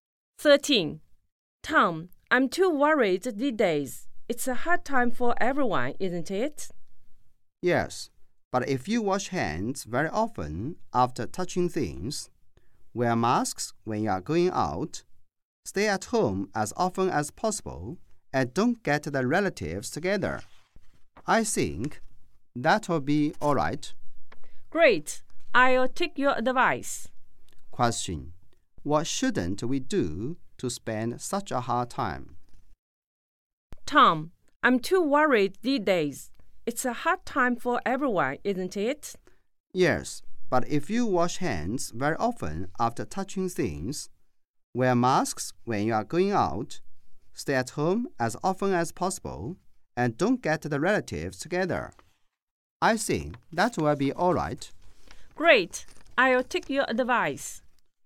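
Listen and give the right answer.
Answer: Get the relatives together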